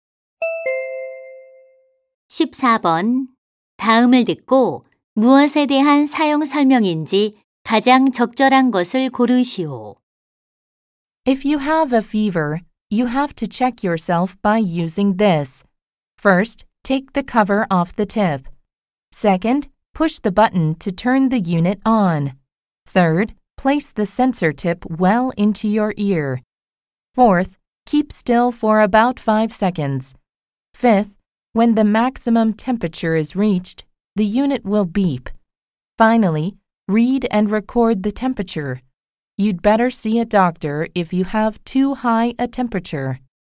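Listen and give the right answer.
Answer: 귀 체온계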